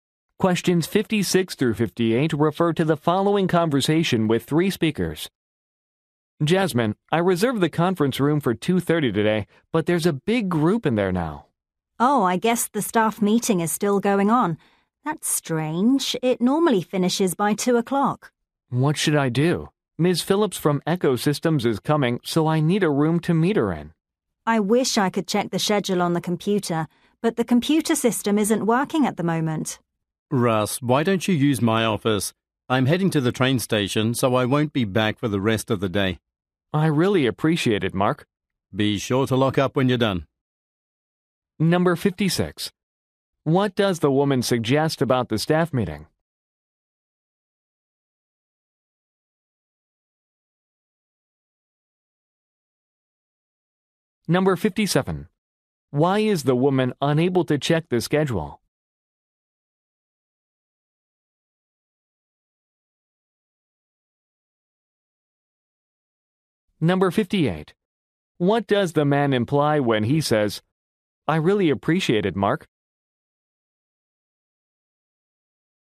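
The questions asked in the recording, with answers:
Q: What does the woman suggest about the staff meeting?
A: It is running late

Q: Why is the woman unable to check the schedule?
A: The computer system isn't working

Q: What does the man imply when he says, "I really appreciate it, Mark"?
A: He will use Mark's office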